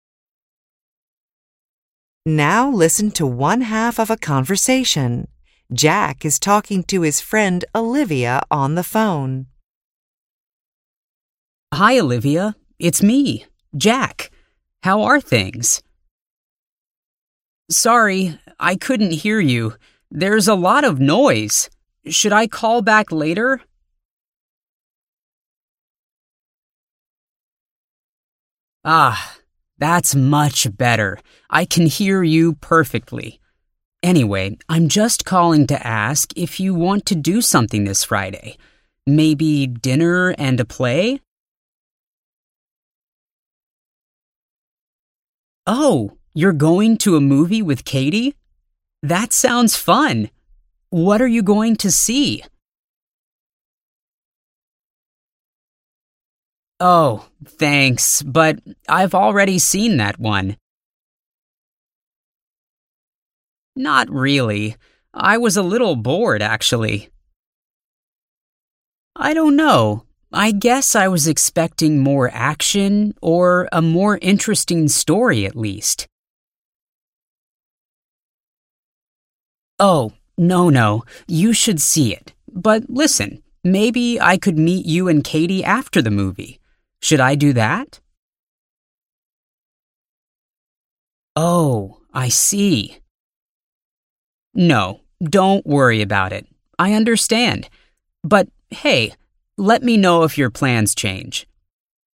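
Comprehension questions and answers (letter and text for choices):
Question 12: When Jack called Olivia, she ____.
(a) couldn't hear him because of a bad connection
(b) was in a noisy area, but she moved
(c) was at the bus stop with her friend Katie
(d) was on her way to see a play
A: (b) was in a noisy area, but she moved

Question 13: Jack ____.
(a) thought the movie was not very exciting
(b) thought the movie had too much action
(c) thinks Olivia shouldn't see the movie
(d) is going out with Olivia and Katie on Friday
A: (a) thought the movie was not very exciting

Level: INTERMEDIATE HYBRID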